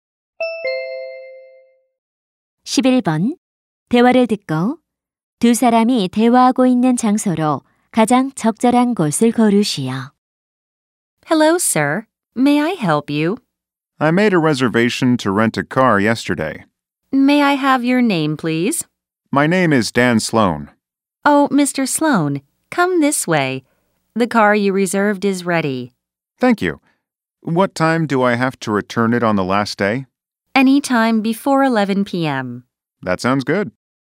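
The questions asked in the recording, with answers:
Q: 대화를 듣고 두 사람이 대화하고 있는 장소로 가장 적절한 곳을 고르시오.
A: 렌터카 사무소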